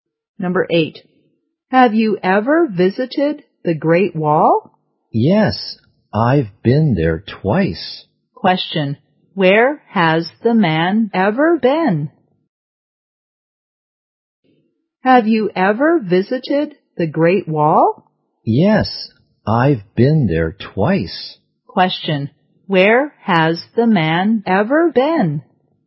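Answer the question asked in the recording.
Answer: The Great Wall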